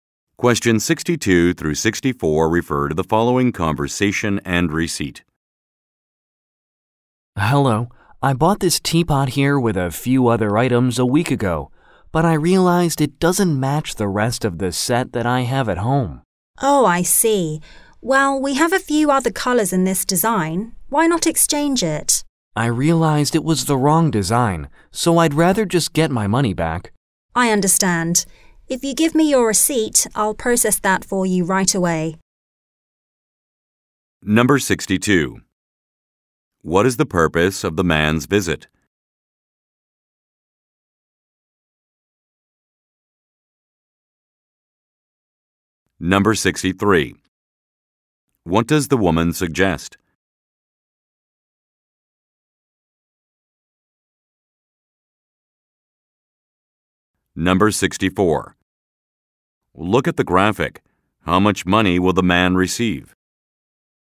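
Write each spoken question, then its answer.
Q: What is the purpose of the man's visit?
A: To return a teapot and get his money back

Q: What does the woman suggest?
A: Exchanging the teapot for another color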